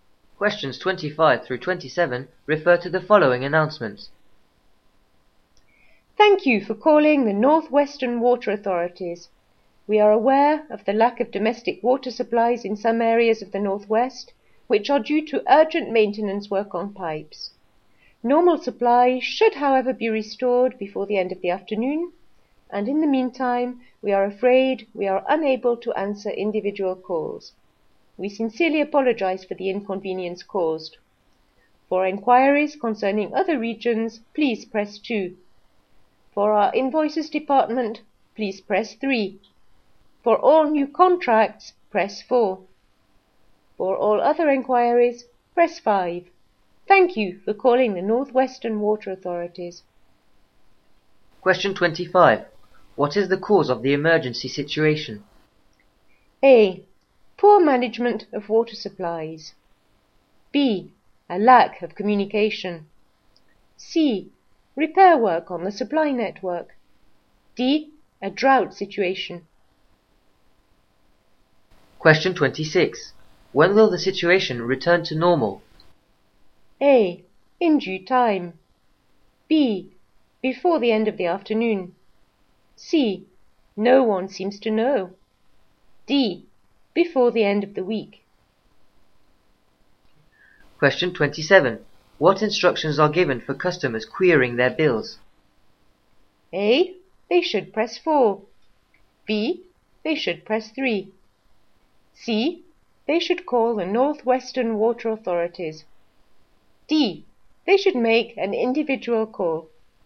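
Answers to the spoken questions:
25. C: Repair work on the supply network.
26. B: Before the end of the afternoon.
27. B: They should press 3.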